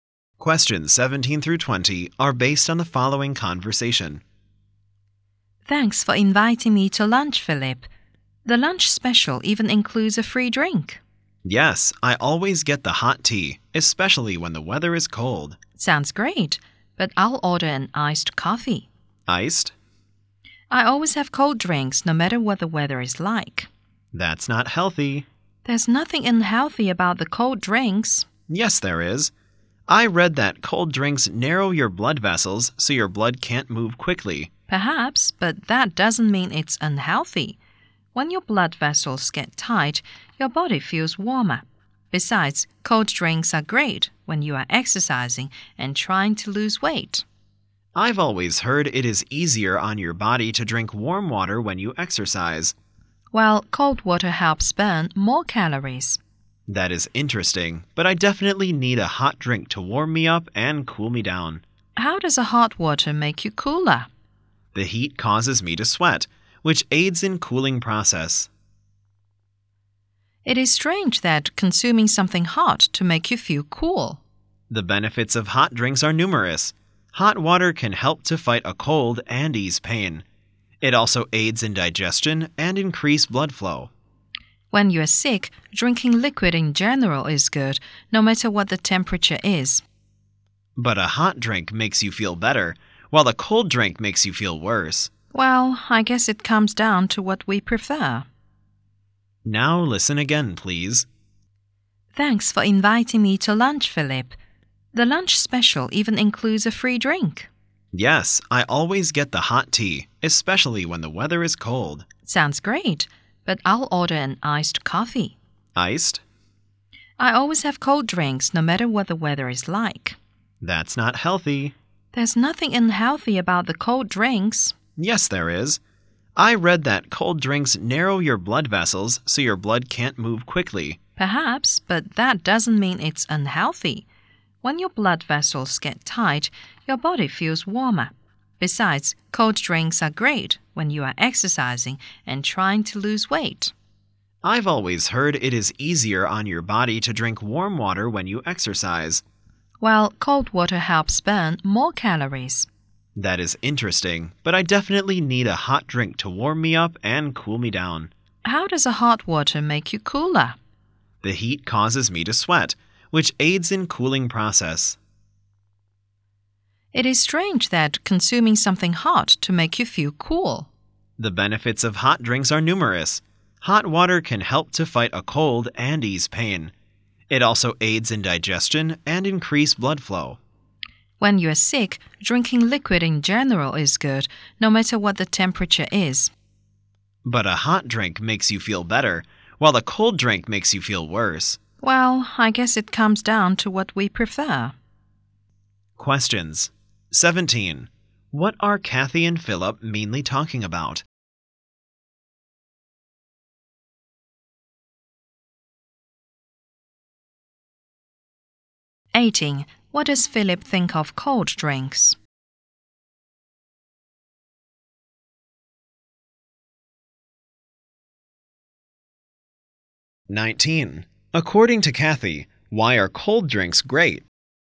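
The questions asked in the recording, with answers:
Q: What are Kathy and Philip mainly talking about?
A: Hot drinks versus cold drinks

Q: What does Philip think of cold drinks?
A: They are unhealthy

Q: According to Kathy, why are cold drinks great?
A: They help when exercising and trying to lose weight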